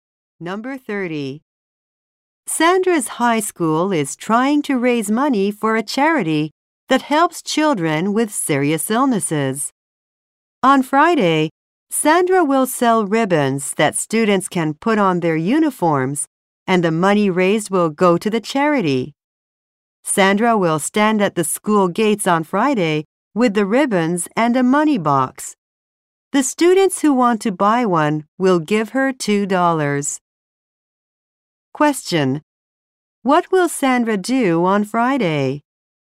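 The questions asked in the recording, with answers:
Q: What will Sandra do on Friday?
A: Sell ribbons for charity at the school gates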